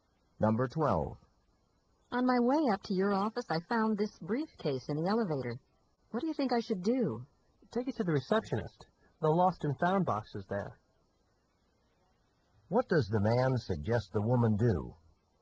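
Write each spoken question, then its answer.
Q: What does the man suggest the woman do?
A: Take the briefcase to the receptionist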